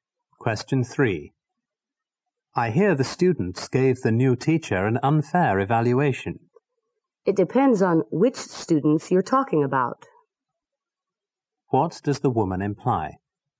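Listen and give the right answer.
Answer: Not all students gave an unfair evaluation.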